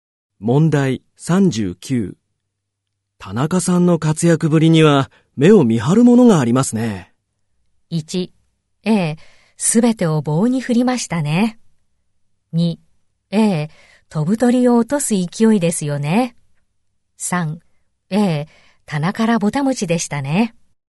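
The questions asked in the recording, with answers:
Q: 田中さんの活躍ぶりには目を見張るものがありますね。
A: 2: 飛ぶ鳥を落とす勢いですよね。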